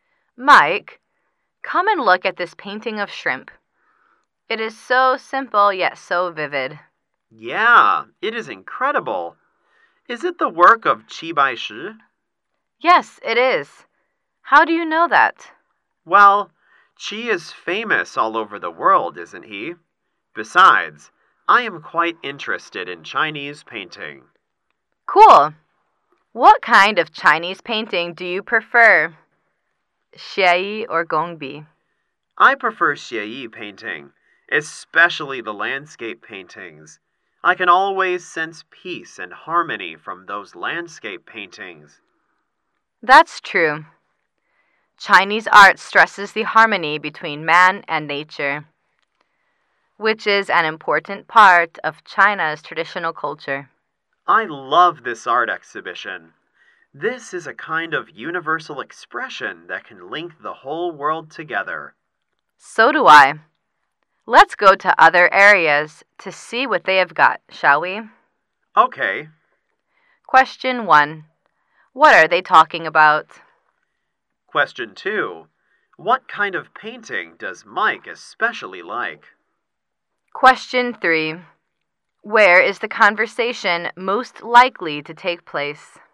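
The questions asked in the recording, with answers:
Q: What are they talking about?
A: Chinese painting

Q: What kind of painting does Mike especially like?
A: Xieyi landscape paintings

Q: Where is the conversation most likely to take place?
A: At an art exhibition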